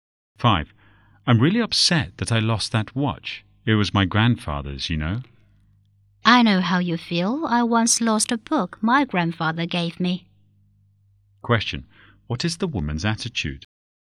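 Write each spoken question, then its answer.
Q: What is the woman's attitude?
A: Sympathetic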